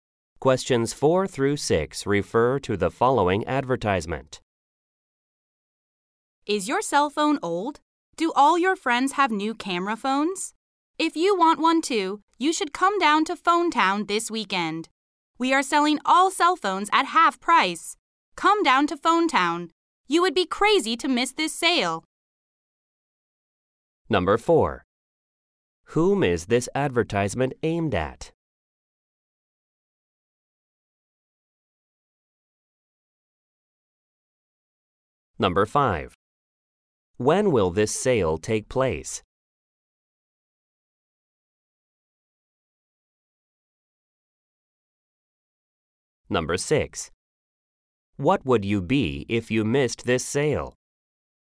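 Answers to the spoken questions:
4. People with old cell phones
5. This weekend
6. Crazy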